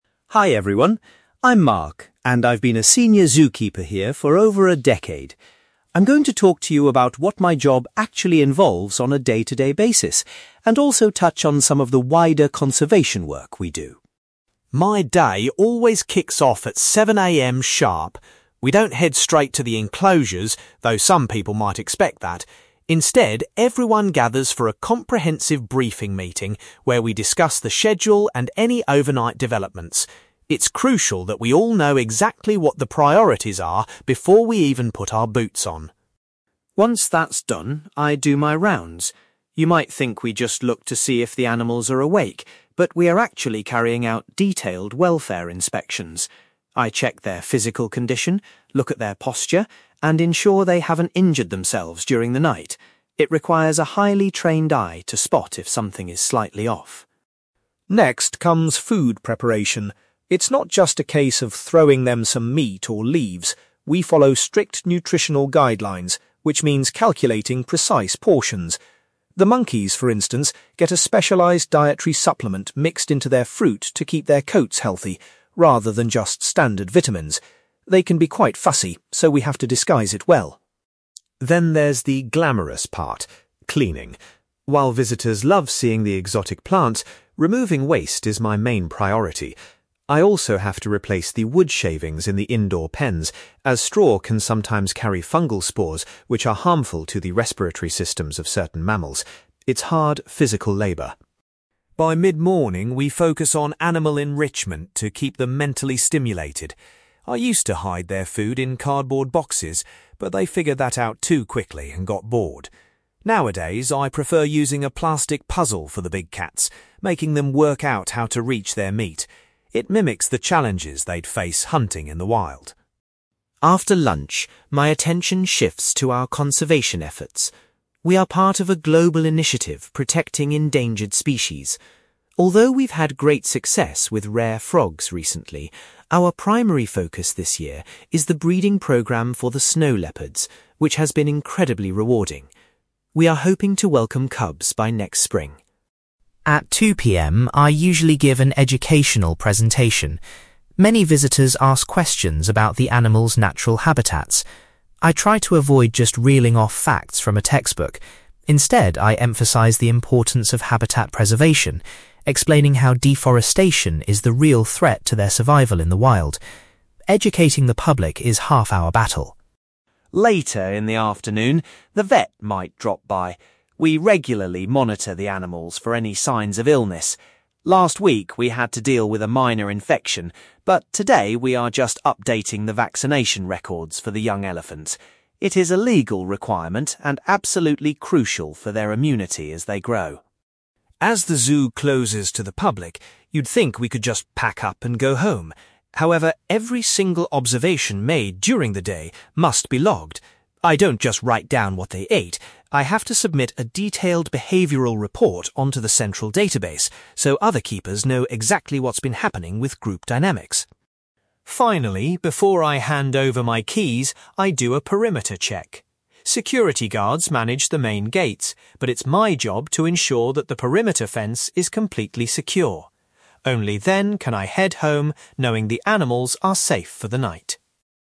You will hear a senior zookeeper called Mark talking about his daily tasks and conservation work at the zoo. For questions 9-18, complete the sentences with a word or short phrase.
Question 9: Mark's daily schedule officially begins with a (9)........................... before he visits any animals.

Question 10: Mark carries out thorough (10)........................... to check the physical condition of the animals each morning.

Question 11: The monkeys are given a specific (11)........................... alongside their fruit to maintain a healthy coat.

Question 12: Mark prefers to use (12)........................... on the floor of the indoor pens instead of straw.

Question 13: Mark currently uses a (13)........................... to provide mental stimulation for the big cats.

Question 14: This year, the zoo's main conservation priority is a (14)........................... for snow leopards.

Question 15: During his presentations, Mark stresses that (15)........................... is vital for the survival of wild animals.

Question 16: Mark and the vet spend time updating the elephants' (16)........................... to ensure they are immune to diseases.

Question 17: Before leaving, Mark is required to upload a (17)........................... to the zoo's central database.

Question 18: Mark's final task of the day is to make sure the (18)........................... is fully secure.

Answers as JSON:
{"9": "briefing meeting", "10": "welfare inspections", "11": "dietary supplement", "12": "wood shavings", "13": "plastic puzzle", "14": "breeding programme", "15": "habitat preservation", "16": "vaccination records", "17": "behavioural report", "18": "perimeter fence"}

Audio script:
Mark: Hi everyone. I'm Mark, and I've been a senior zookeeper here for over a decade. I'm going to talk to you about what my job actually involves on a day-to-day basis, and also touch on some of the wider conservation work we do.
My day always kicks off at 7 a.m. sharp. We don't head straight to the enclosures, though some people might expect that. Instead, everyone gathers for a comprehensive briefing meeting where we discuss the schedule and any overnight developments. It's crucial that we all know exactly what the priorities are before we even put our boots on.
Once that's done, I do my rounds. You might think we just look to see if the animals are awake, but we are actually carrying out detailed welfare inspections. I check their physical condition, look at their posture, and ensure they haven't injured themselves during the night. It requires a highly trained eye to spot if something is slightly off.
Next comes food preparation. It's not just a case of throwing them some meat or leaves. We follow strict nutritional guidelines, which means calculating precise portions. The monkeys, for instance, get a specialized dietary supplement mixed into their fruit to keep their coats healthy, rather than just standard vitamins. They can be quite fussy, so we have to disguise it well!
Then there's the glamorous part – cleaning. While visitors love seeing the exotic plants, removing waste is my main priority. I also have to replace the wood shavings in the indoor pens, as straw can sometimes carry fungal spores which are harmful to the respiratory systems of certain mammals. It's hard, physical labour.
By mid-morning, we focus on animal enrichment to keep them mentally stimulated. I used to hide their food in cardboard boxes, but they figured that out too quickly and got bored. Nowadays, I prefer using a plastic puzzle for the big cats, making them work out how to reach their meat. It mimics the challenges they'd face hunting in the wild.
After lunch, my attention shifts to our conservation efforts. We are part of a global initiative protecting endangered species. Although we've had great success with rare frogs recently, our primary focus this year is the breeding programme for the snow leopards, which has been incredibly rewarding. We are hoping to welcome cubs by next spring.
At 2 p.m., I usually give an educational presentation. Many visitors ask questions about the animals' natural habitats. I try to avoid just reeling off facts from a textbook; instead, I emphasize the importance of habitat preservation, explaining how deforestation is the real threat to their survival in the wild. Educating the public is half our battle.
Later in the afternoon, the vet might drop by. We regularly monitor the animals for any signs of illness. Last week we had to deal with a minor infection, but today we are just updating the vaccination records for the young elephants. It is a legal requirement and absolutely crucial for their immunity as they grow.
As the zoo closes to the public, you'd think we could just pack up and go home. However, every single observation made during the day must be logged. I don't just write down what they ate; I have to submit a detailed behavioural report onto the central database so other keepers know exactly what's been happening with group dynamics.
Finally, before I hand over my keys, I do a perimeter check. Security guards manage the main gates, but it's my job to ensure that the perimeter fence is completely secure. Only then can I head home, knowing the animals are safe for the night.

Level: B2